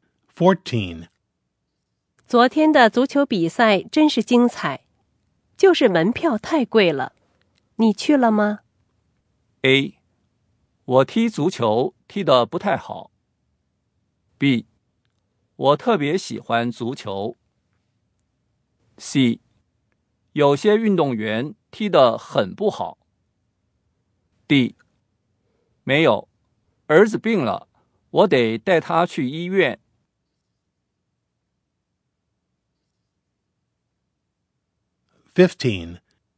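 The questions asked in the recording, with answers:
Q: 昨天的足球比赛真是精彩,就是门票太贵了。你去了吗?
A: D: 没有,儿子病了,我得带他去医院。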